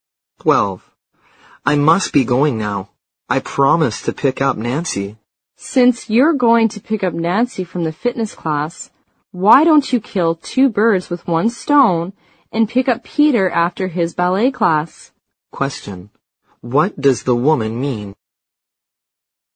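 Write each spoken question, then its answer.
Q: What does the woman mean?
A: The man should pick up Peter from his ballet class as well as Nancy.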